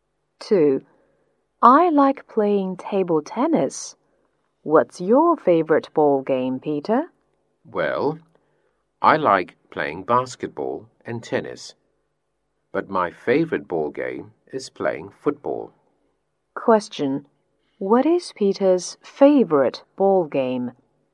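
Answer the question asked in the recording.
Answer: Football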